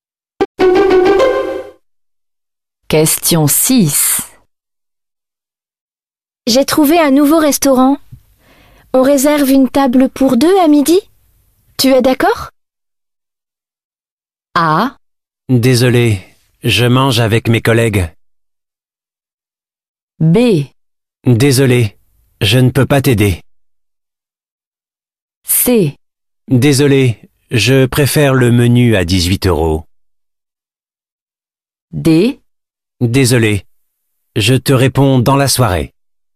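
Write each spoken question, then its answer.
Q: On réserve une table pour deux à midi? Tu es d'accord?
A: A: Désolé, je mange avec mes collègues.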